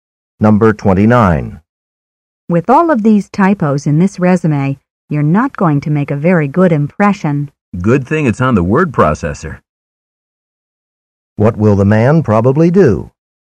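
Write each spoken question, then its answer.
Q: What will the man probably do?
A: Correct the typos on the word processor.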